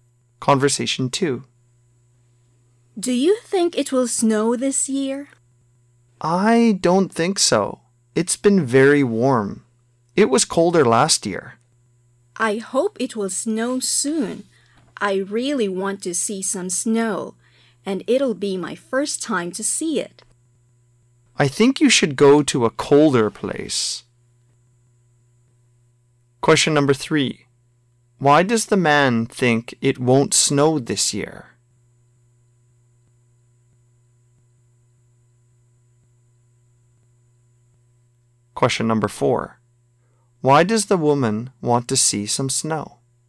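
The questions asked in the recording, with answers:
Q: Why does the man think it won't snow this year?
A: Because it has been very warm

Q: Why does the woman want to see some snow?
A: It will be her first time to see it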